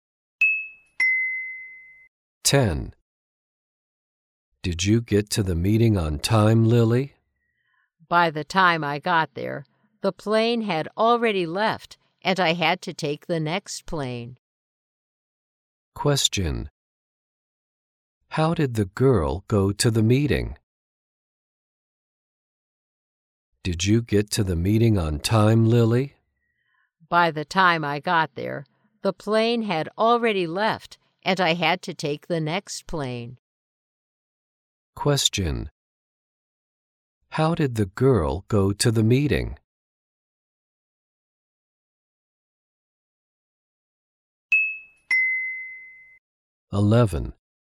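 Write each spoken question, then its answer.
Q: How did the girl go to the meeting?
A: By plane.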